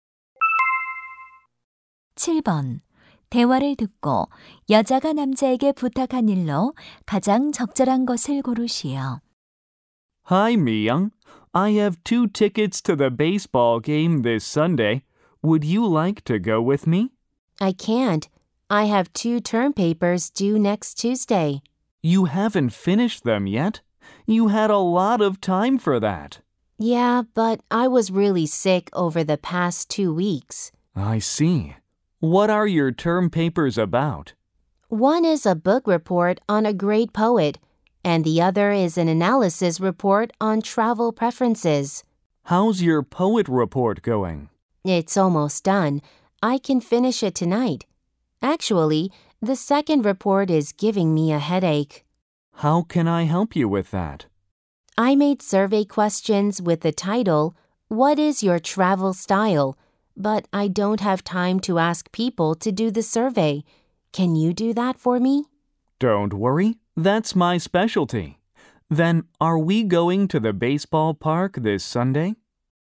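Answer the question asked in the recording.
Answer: 여행 선호도 설문 조사하기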